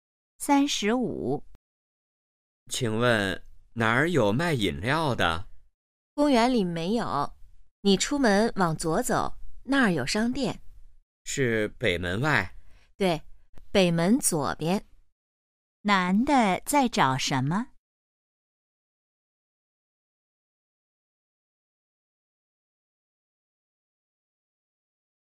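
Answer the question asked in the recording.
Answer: 卖饮料的地方(商店)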